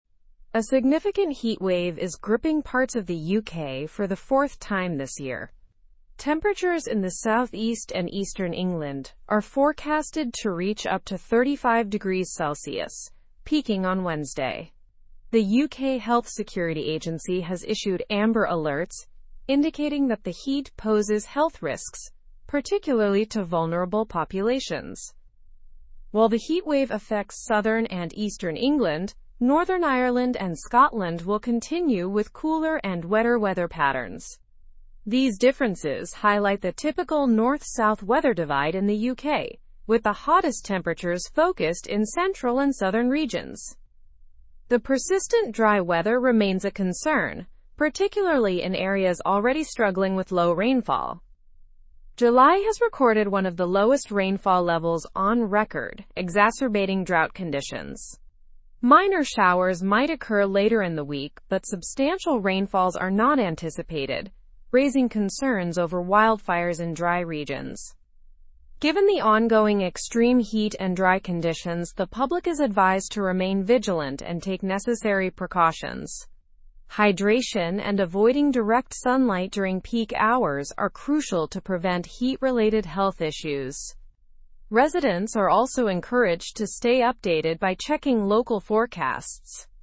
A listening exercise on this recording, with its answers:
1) What is happening in the UK for the fourth time this year?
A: A significant heatwave is occurring for the fourth time.

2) Where are the highest temperatures expected in the UK?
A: In the southeast and eastern England.

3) What alerts have been issued by the UK Health Security Agency?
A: Amber alerts have been issued for health risks.

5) What weather concern is exacerbated by low rainfall?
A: Drought conditions are worsened.

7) What are residents advised to do during the extreme heat?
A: They are advised to stay hydrated and avoid direct sunlight.

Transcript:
A significant heatwave is gripping parts of the UK for the fourth time this year. Temperatures in the southeast and eastern England are forecasted to reach up to 35°C, peaking on Wednesday. The UK Health Security Agency has issued amber alerts indicating that the heat poses health risks, particularly to vulnerable populations.
While the heatwave affects southern and eastern England, Northern Ireland and Scotland will continue with cooler and wetter weather patterns. These differences highlight the typical north-south weather divide in the UK, with the hottest temperatures focused in central and southern regions.
The persistent dry weather remains a concern, particularly in areas already struggling with low rainfall. July has recorded one of the lowest rainfall levels on record, exacerbating drought conditions. Minor showers might occur later in the week, but substantial rainfalls are not anticipated, raising concerns over wildfires in dry regions.
Given the ongoing extreme heat and dry conditions, the public is advised to remain vigilant and take necessary precautions. Hydration and avoiding direct sunlight during peak hours are crucial to prevent heat-related health issues. Residents are also encouraged to stay updated by checking local forecasts.

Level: Level 3